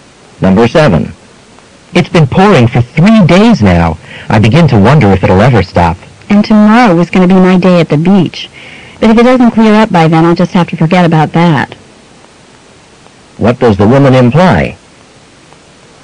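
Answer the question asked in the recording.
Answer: She may have to cancel her beach trip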